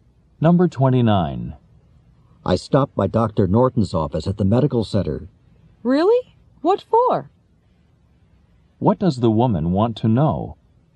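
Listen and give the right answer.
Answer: Why the man went to Dr. Norton's office.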